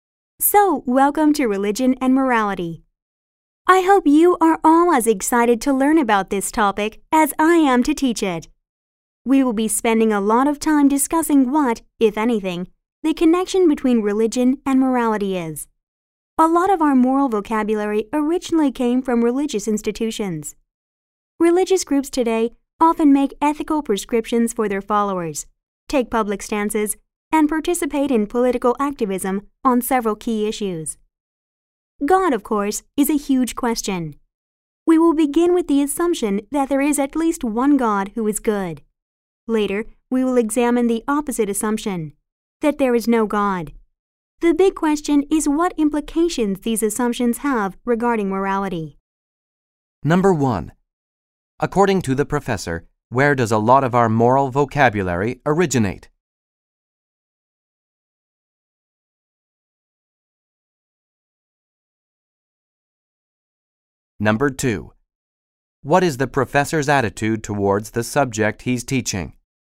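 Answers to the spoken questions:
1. From religious institutions
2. He is excited about it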